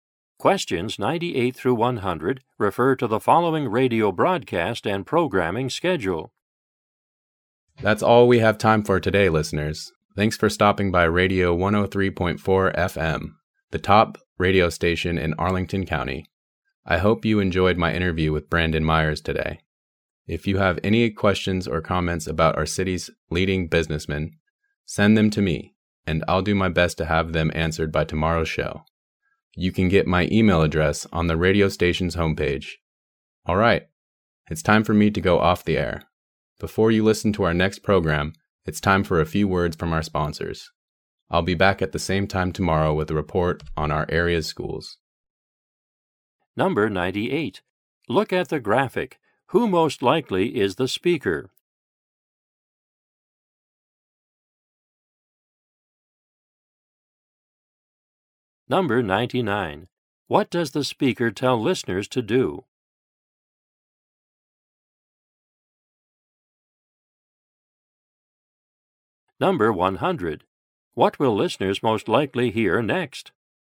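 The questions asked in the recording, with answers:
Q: What does the speaker tell listeners to do?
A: Send questions or comments about the city's business leaders by email

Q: What will listeners most likely hear next?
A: Advertisements from sponsors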